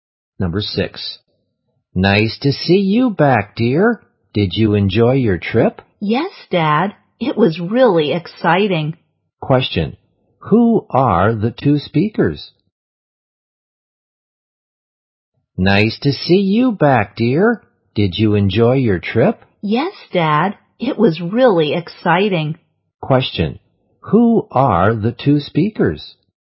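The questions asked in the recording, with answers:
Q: Who are the two speakers?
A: A father and his child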